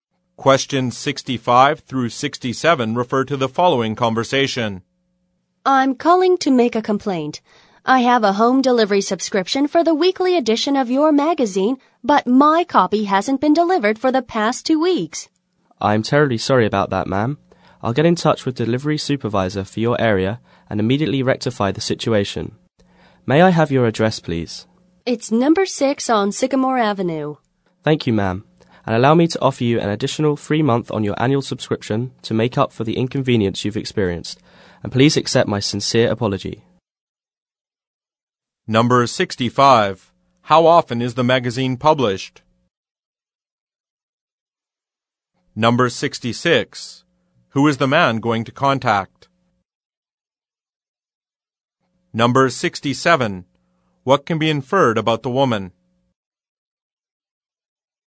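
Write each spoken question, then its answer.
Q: How often is the magazine published?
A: Weekly

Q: Who is the man going to contact?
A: The delivery supervisor for her area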